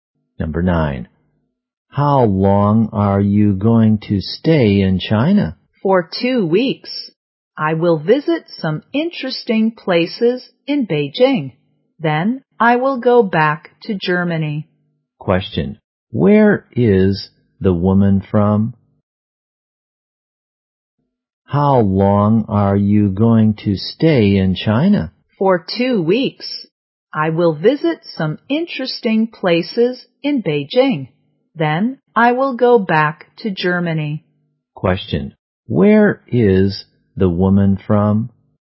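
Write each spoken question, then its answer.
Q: Where is the woman from?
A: Germany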